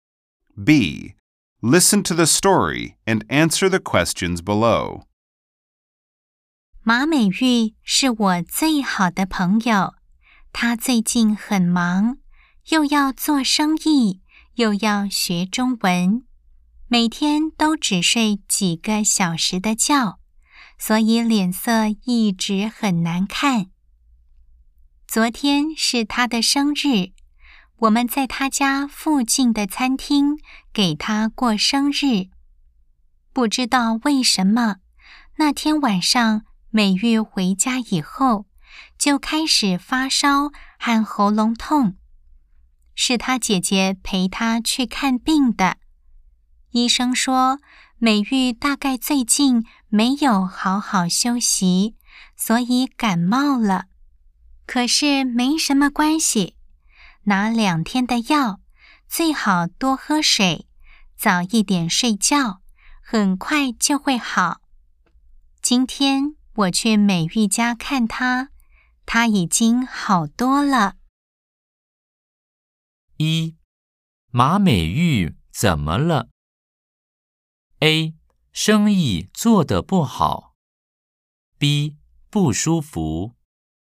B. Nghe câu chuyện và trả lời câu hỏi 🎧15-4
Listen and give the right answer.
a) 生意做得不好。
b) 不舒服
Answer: b) 不舒服